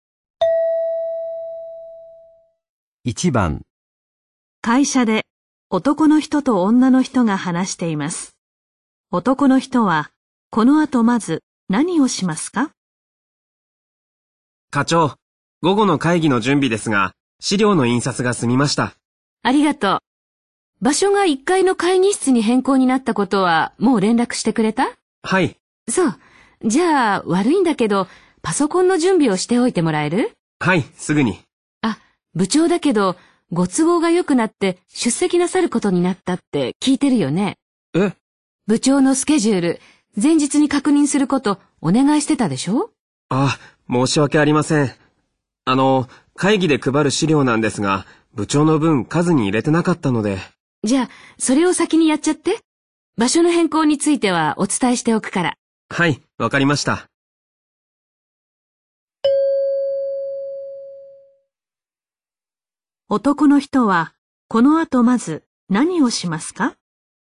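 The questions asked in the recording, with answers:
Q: 男の人は、この後まず何をしますか?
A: 部長の分の資料を用意する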